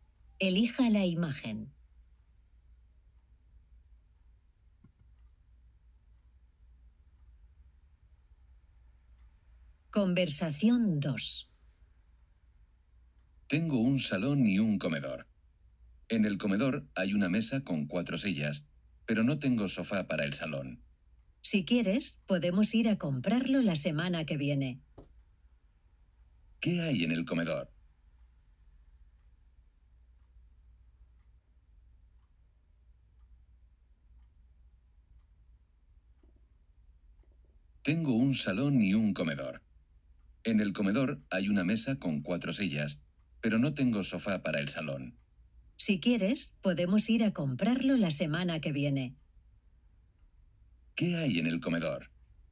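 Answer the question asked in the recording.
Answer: Una mesa con 4 sillas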